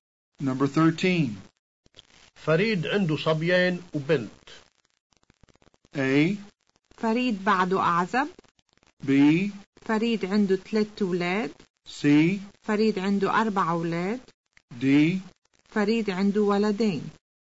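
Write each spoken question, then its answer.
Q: فريد عنده صبيان وبنت.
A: B: فريد عنده 3 أولاد.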